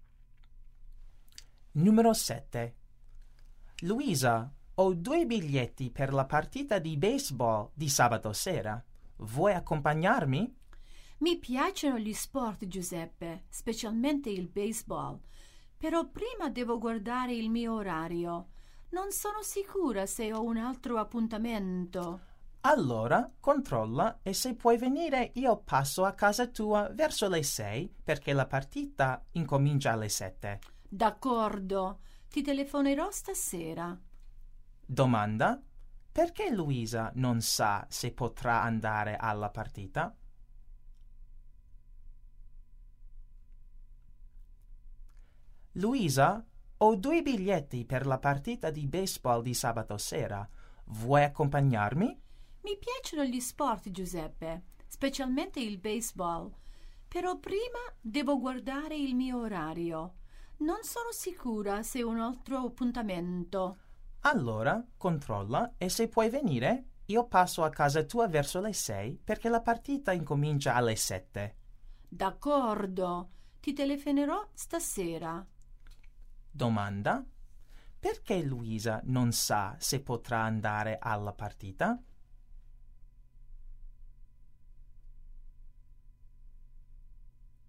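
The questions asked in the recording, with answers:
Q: Perché Luisa non sa se potrà andare alla partita?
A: Forse ha un altro appuntamento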